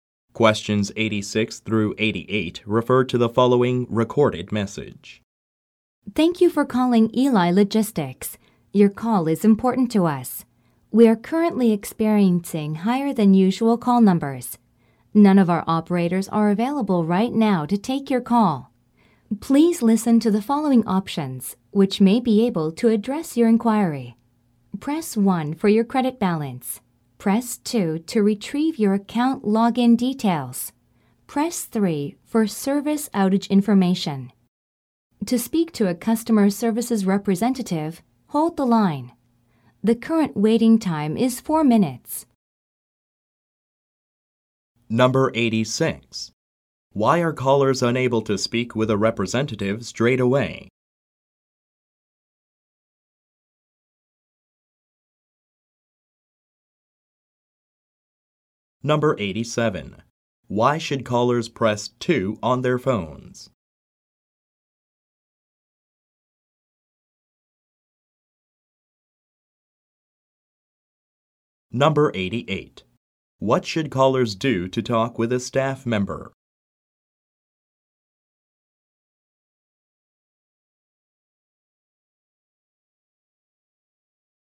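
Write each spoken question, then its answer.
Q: Why are callers unable to speak with a representative straight away?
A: Call numbers are higher than usual; no operators are available

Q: Why should callers press 2 on their phones?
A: To retrieve their account login details

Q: What should callers do to talk with a staff member?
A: Hold the line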